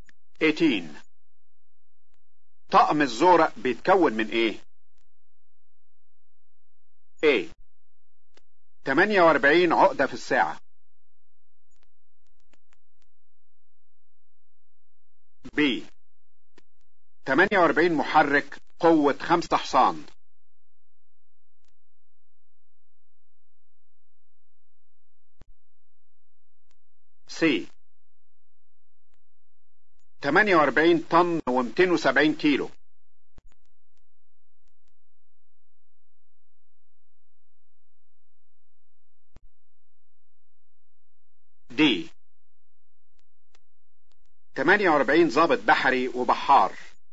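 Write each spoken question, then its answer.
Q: طقم الزورق بيتكون من ايه؟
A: D: 48 ضابط بحري وبحار.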